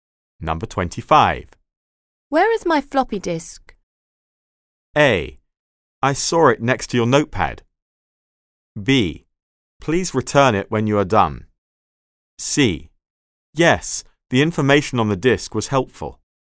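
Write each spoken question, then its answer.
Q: Where is my floppy disk?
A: A: I saw it next to your notepad.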